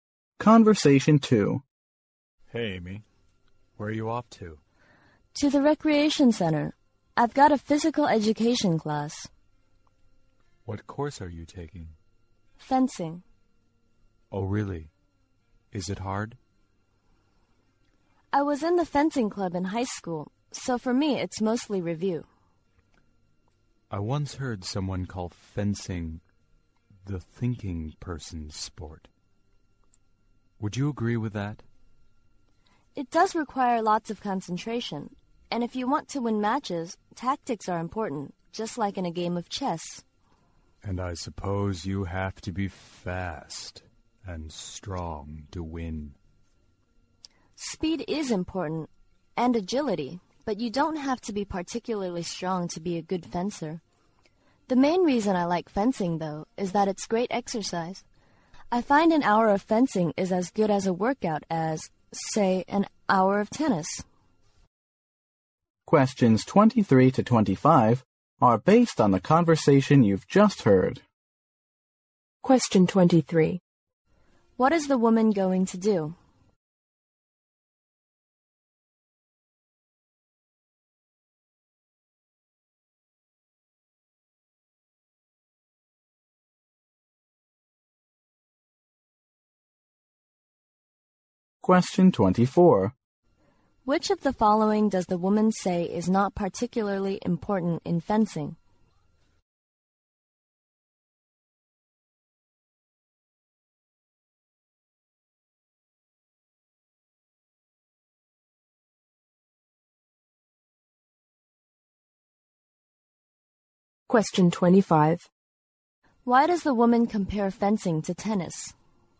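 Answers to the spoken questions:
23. Attend a fencing class
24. Strength
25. To show fencing is great exercise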